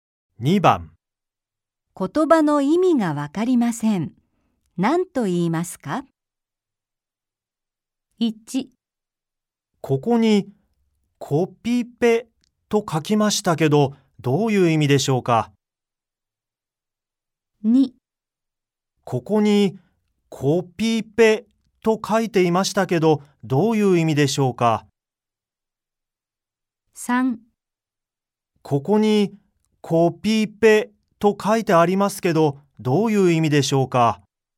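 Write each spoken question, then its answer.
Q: 言葉の意味がわかりません。何と言いますか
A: 3: ここに、コピペと書いてありますけど、どういう意味でしょうか。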